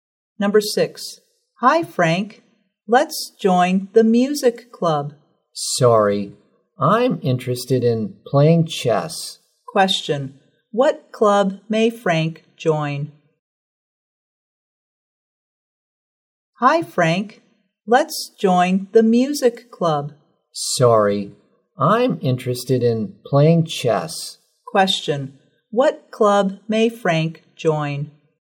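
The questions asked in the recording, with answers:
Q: What club may Frank join?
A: The chess club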